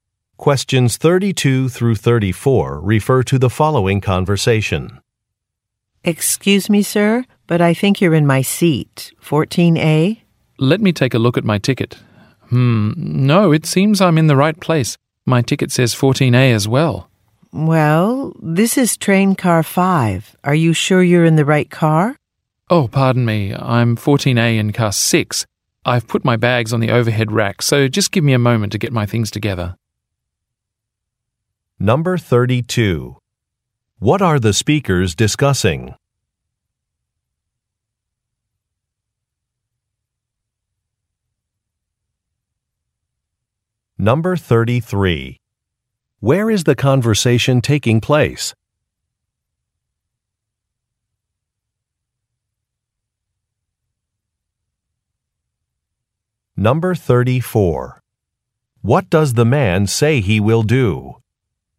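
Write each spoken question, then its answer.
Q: What are the speakers discussing?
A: A seat assignment (they both think they have seat 14A)

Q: Where is the conversation taking place?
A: On a train

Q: What does the man say he will do?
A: Get his things (bags) together and move to his seat in car 6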